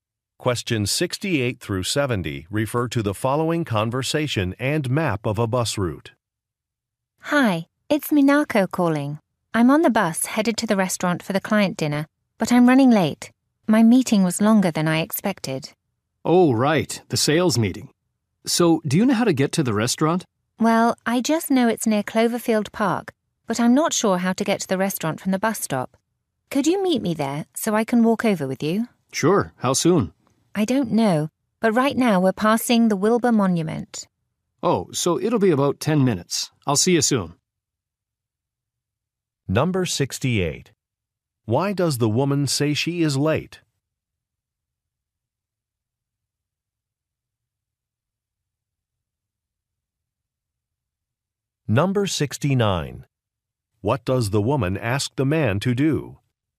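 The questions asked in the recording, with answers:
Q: Why does the woman say she is late?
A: Her meeting ran long

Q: What does the woman ask the man to do?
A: Meet her at the bus stop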